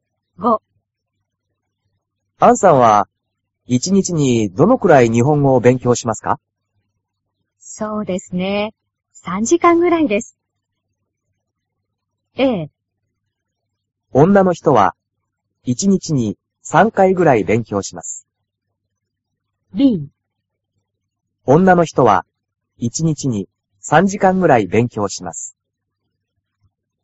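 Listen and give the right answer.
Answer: B: 女の人は一日に3時間ぐらい勉強します。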